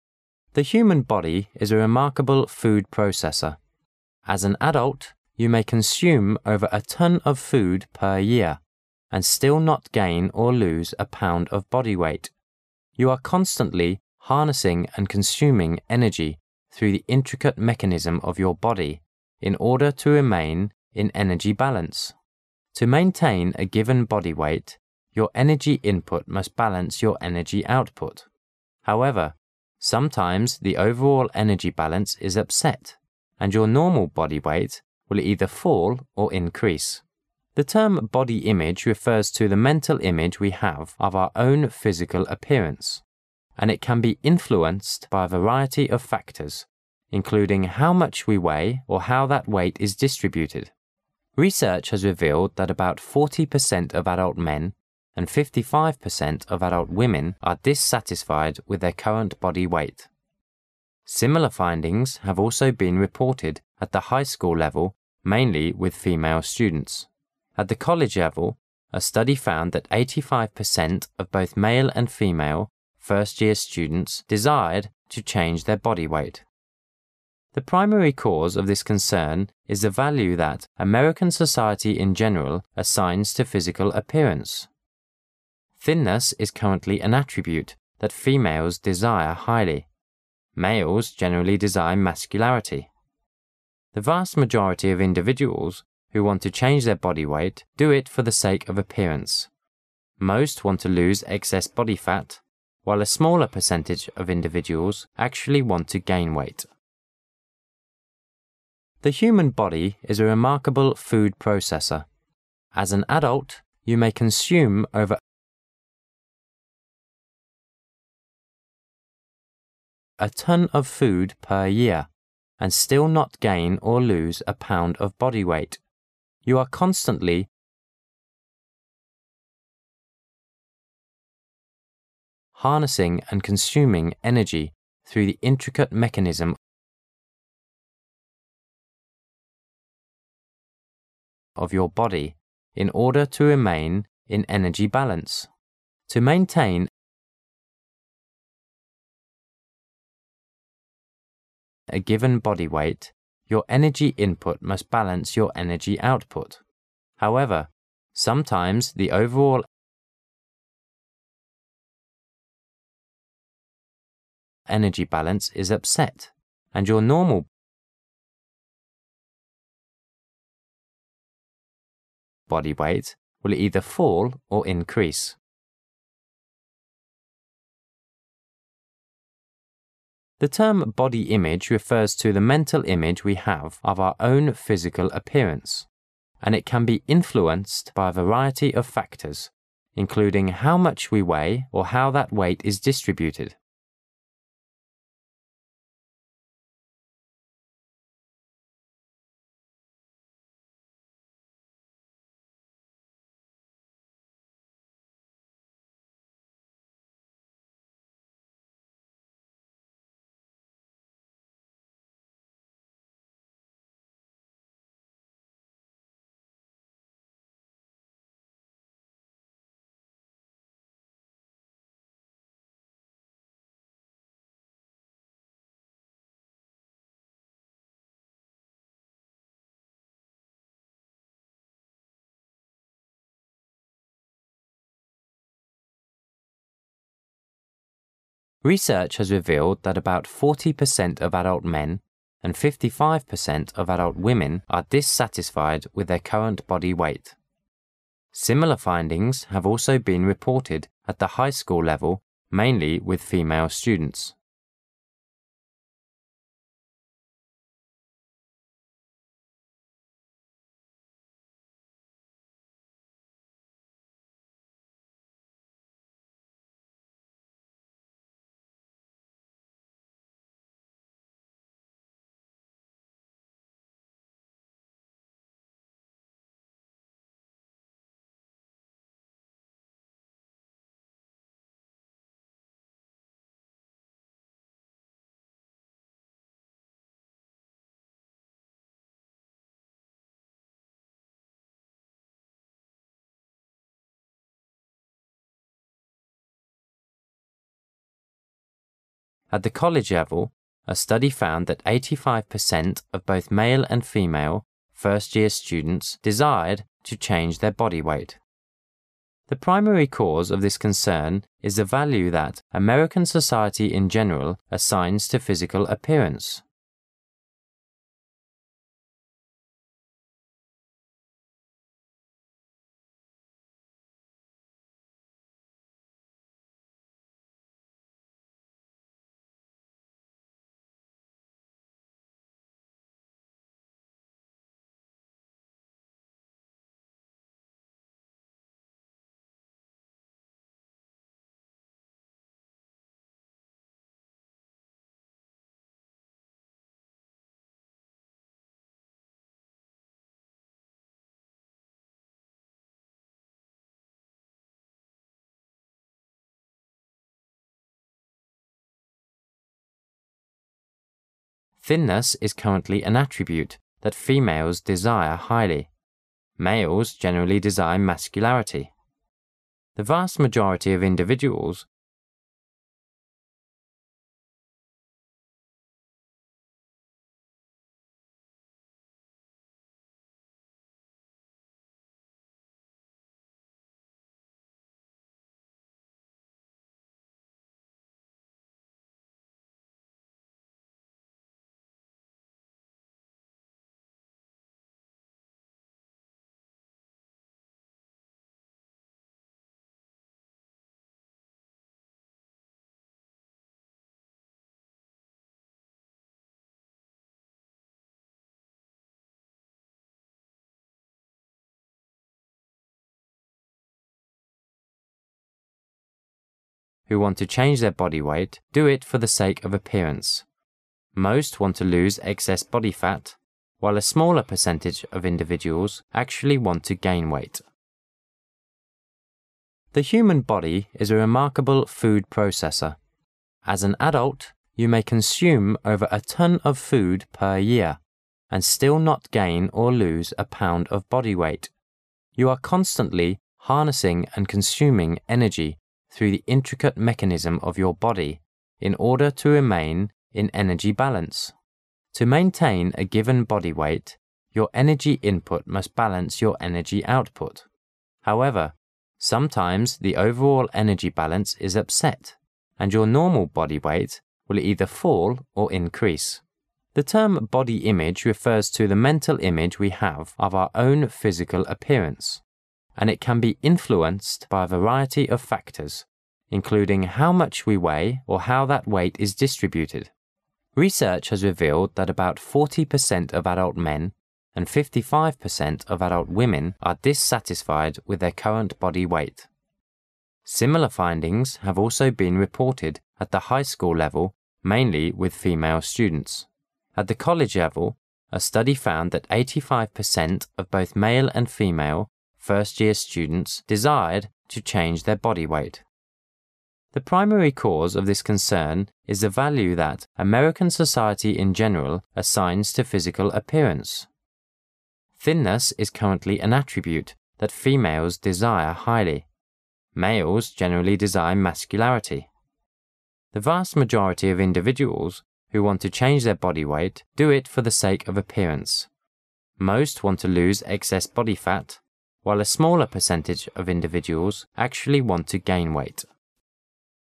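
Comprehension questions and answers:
Section C Directions:In this section, you will hear a passage three times. When the passage is read for the first time, you should listen carefully for its general idea. When the passage is read for the second time, you are required to fill in the blanks numbered from 36 to 43 with the exact words you have just heard. For blanks numbered from 44 to 46 you are required to fill in the missing information. For these blanks, you can either use the exact words you have just heard or write down the main points in your own words. Finally, when the passage is read for the third time, you should check what you have written.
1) As an adult, you may consume 1 a ton of food per year and still not gain or lose a pound of body weight.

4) To 4 a given body weight, your energy input must balance your energy output.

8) The term body image refers to the mental image we have of our own physical appearance, and 8 .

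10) 10 .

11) 11 who want to change their body weight do it for the sake of appearance;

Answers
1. over
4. maintain
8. it can be influenced by a variety of factors, including how much we weigh or how that weight is distributed
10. The primary cause of this concern is the value that American society in general assigns to physical appearance
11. The vast majority of individuals

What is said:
[解析] 36-46 The human body is a remarkable food processor. As an adult, you may consume over a ton of food per year and still not gain or lose a pound of body weight. You are constantly harnessing and consuming energy through the intricate mechanism of your body in order to remain in energy balance. To maintain a given body weight, your energy input must balance your energy output. However, sometimes the overall energy balance is upset, and your normal body weight will either fall or increase. The term body image refers to the mental image we have of our own physical appearance, and it can be influenced by a variety of factors, including how much we weigh or how that weight is distributed. 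Research has revealed that about 40 percent of adult men and 55 percent of adult women are dissatisfied with their current body weight. Similar findings have also been reported at the high school level, mainly with female students. At the college level, a study found that 85 percent of both male and female first-year students desired to change their body weight. The primary cause of this concern is the value that American society in general assigns to physical appearance. Thinness is currently an attribute that females desire highly. The vast majority of individuals who want to change their body weight do it for the sake of appearance; most want to lose excess body fat, while a smaller percentage of individuals actually want to gain weight.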